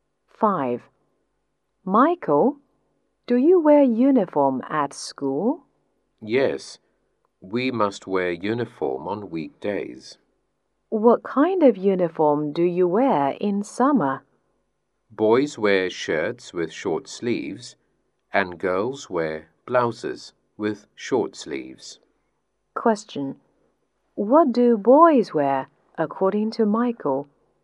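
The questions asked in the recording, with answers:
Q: What do boys wear, according to Michael?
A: Shirts with short sleeves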